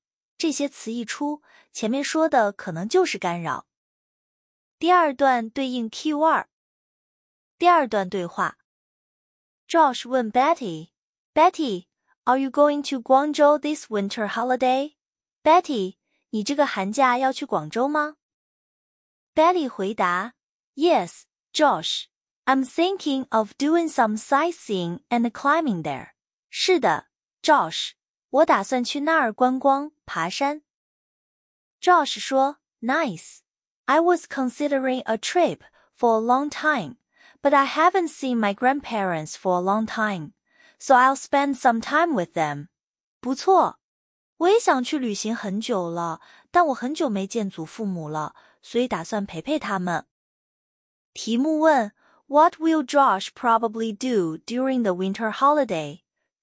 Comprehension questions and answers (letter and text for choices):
第一节 听 5 段短对话,每段读两遍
What will Josh probably do during the winter holiday?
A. Climb mountains.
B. Travel to Guangzhou.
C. Visit his grandparents.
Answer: C. Visit his grandparents.

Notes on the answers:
观光、爬山、去广州都是 Betty 的;问的是 Josh → 转折 but 后陪祖父母。

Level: 高中